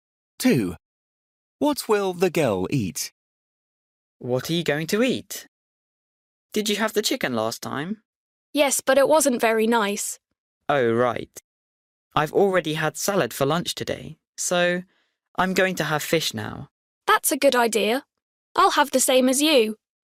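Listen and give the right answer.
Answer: Fish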